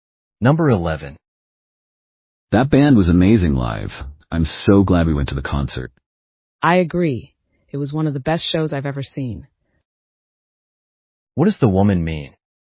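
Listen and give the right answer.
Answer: She also thought the concert was excellent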